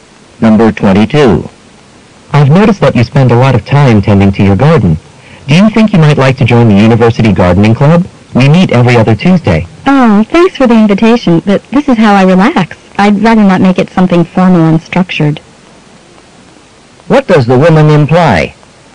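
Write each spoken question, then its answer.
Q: What does the woman imply?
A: She won't join the club; she prefers gardening informally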